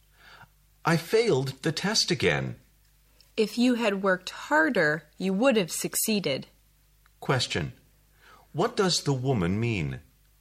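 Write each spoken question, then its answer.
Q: What does the woman mean?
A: The man didn't work hard enough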